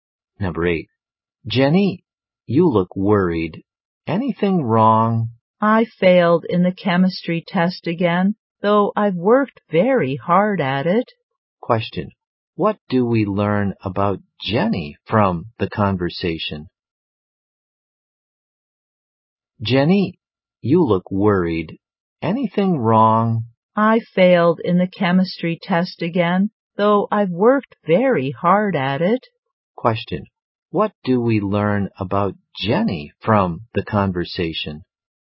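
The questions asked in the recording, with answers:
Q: Question. What do we learn about Jenny from the conversation?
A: She failed the chemistry test again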